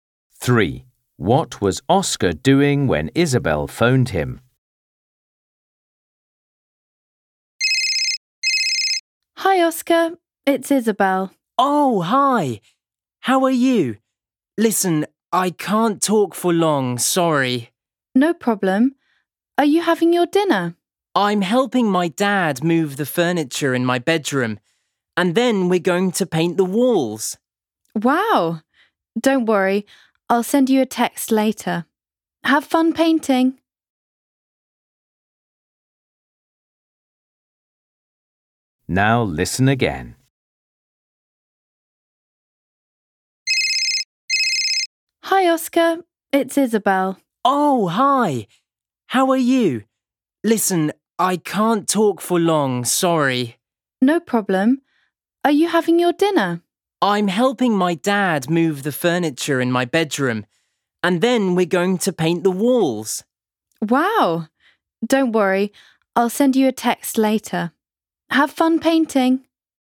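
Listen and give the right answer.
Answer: moving furniture in his bedroom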